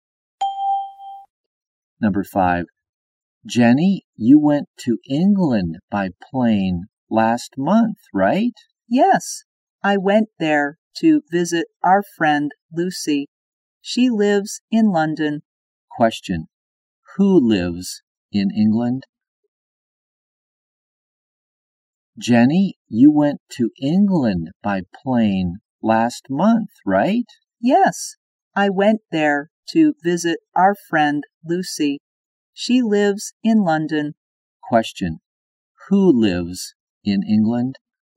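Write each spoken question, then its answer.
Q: Who lives in England?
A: Lucy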